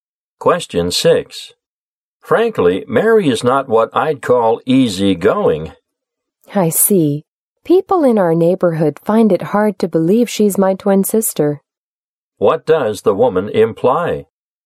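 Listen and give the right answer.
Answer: She and her twin sister Mary are very different in personality.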